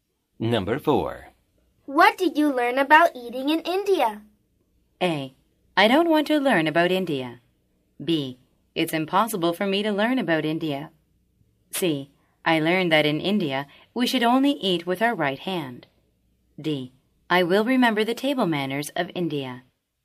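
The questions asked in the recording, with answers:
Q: What did you learn about eating in India?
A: C: I learned that in India, we should only eat with our right hand.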